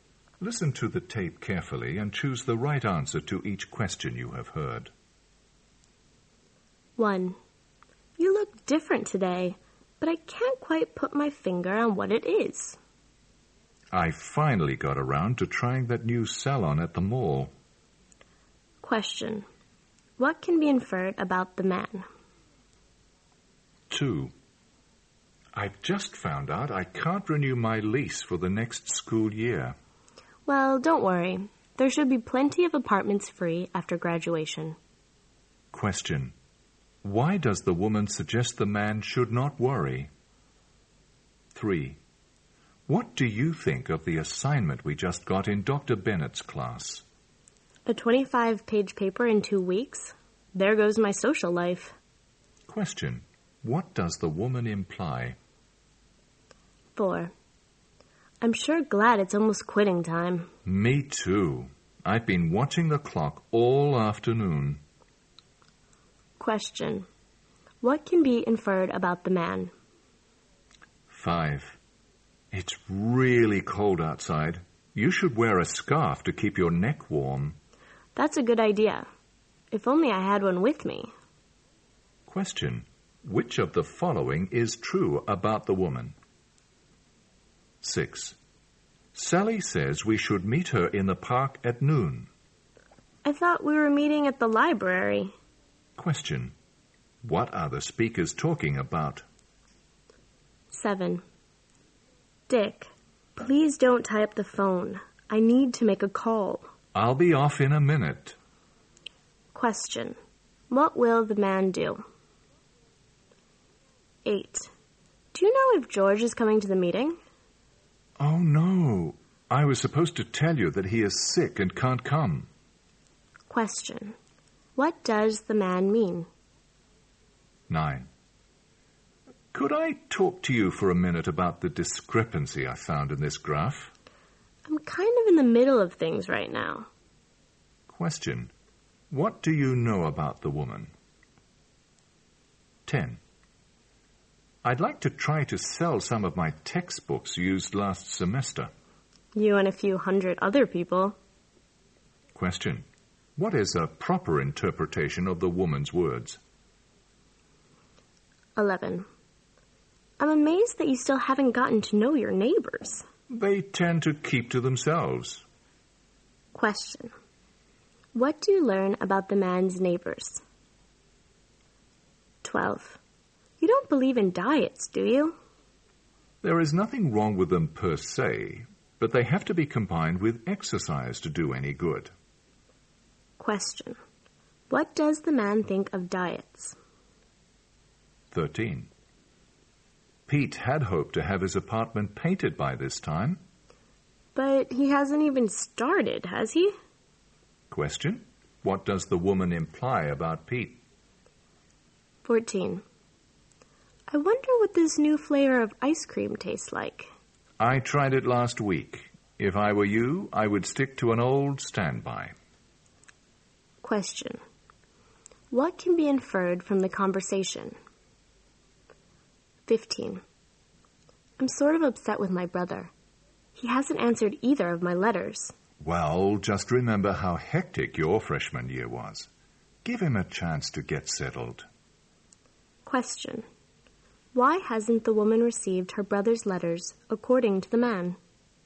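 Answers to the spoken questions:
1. He got his hair done at the new salon at the mall
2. Many apartments will be free after graduation
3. She will have no time for social life
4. He is eager to finish work
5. She doesn't have a scarf with her
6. Where to meet Sally
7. Finish his phone call soon
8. George is sick and won't come; he forgot to say so
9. She is busy right now
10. Many other people are also trying to sell used textbooks
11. They keep to themselves
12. They only work when combined with exercise
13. He hasn't started painting his apartment
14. The woman didn't like the new flavor
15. Her brother is busy with his hectic freshman year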